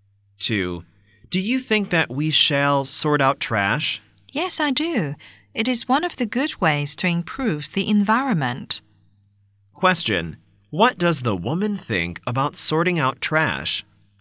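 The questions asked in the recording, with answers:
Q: What does the woman think about sorting out trash?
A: It is a good way to improve the environment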